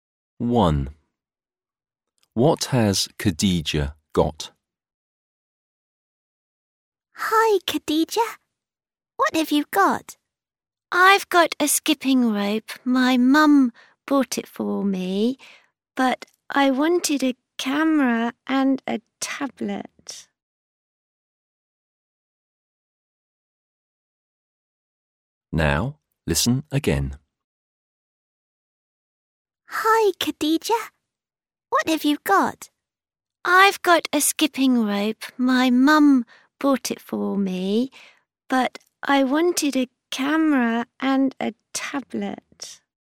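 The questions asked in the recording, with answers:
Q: What has Khadija got?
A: A skipping rope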